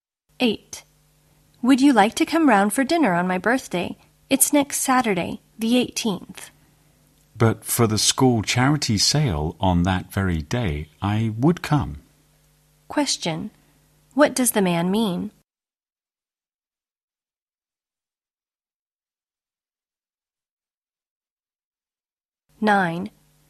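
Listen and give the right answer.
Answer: He can't come because of the school charity sale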